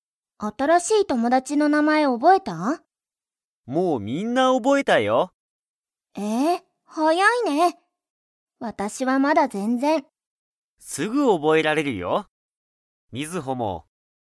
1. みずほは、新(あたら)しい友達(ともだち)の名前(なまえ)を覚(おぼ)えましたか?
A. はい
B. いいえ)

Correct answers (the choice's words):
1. いいえ)

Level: Level 1